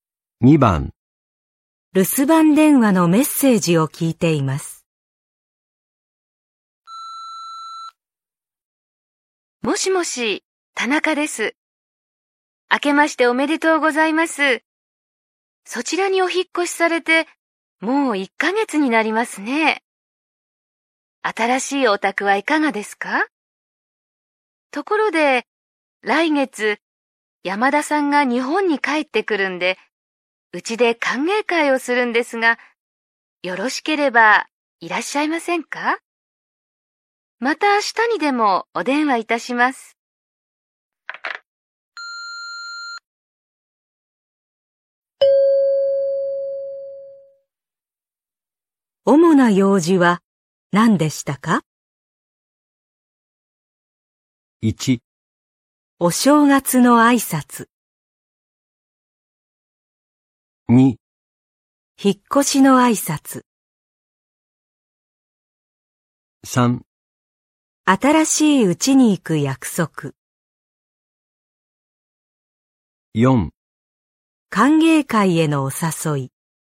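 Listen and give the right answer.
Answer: 4: 歓迎会へのお誘い。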